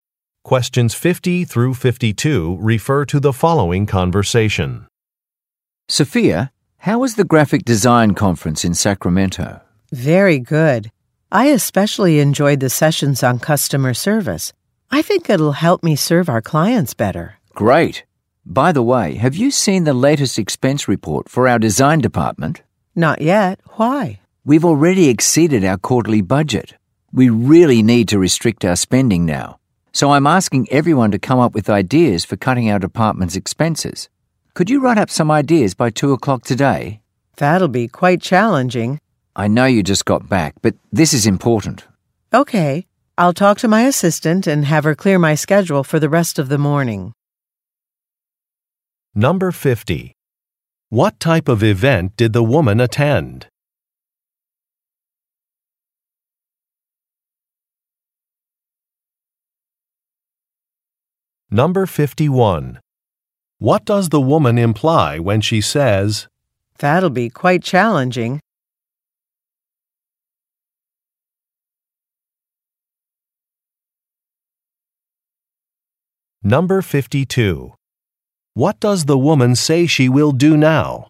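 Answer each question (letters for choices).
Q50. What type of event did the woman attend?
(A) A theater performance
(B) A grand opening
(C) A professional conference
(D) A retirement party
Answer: C

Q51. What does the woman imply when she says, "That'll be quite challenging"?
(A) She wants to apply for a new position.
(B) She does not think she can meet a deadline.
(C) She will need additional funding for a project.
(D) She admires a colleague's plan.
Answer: B

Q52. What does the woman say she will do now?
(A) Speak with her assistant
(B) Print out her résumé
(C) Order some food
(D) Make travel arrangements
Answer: A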